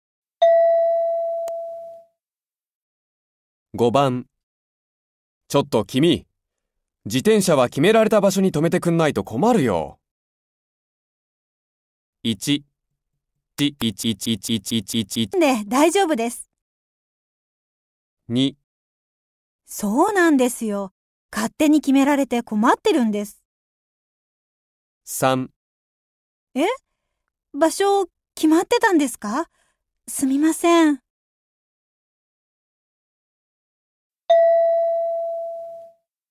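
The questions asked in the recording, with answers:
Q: ちょっと君、自転車は決められた場所に止めてくんないと困るよ。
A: 3: え?場所決まってたんですか?すみません。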